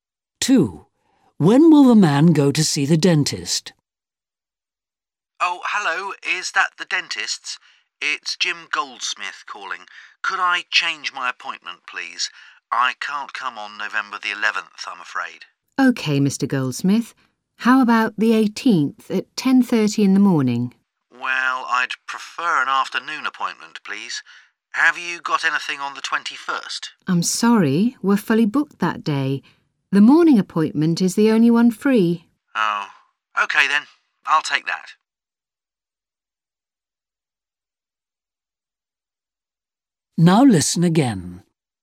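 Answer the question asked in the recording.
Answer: On the 18th at 10:30 in the morning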